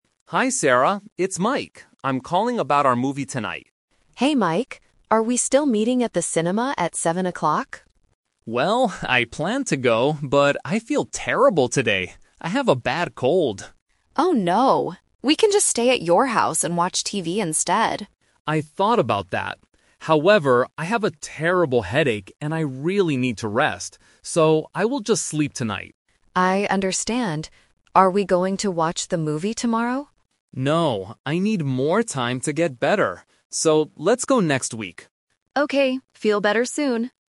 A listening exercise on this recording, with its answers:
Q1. What will Mike do tonight?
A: Sleep

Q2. Why can't Mike go out tonight?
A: He has a bad cold.

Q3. When are they going to watch the movie?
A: Next week

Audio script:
Mike: Hi, Sarah. It's Mike. I'm calling about our movie tonight.
Sarah: Hey Mike! Are we still meeting at the cinema at 7:00?
Mike: Well, I planned to go, but I feel terrible today. I have a bad cold.
Sarah: Oh no! We can just stay at your house and watch TV instead.
Mike: I thought about that. However, I have a terrible headache, and I really need to rest. So, I will just sleep tonight.
Sarah: I understand. Are we going to watch the movie tomorrow?
Mike: No, I need more time to get better. So, let's go next week.